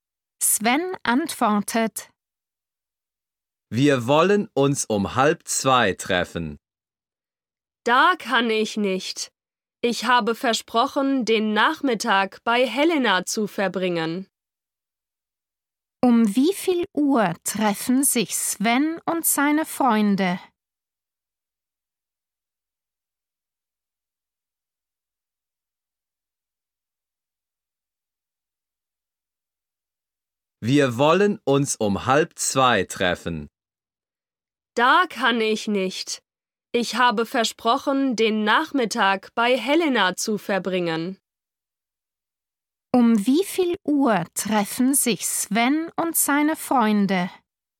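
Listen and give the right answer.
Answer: um 2:30 (halb drei)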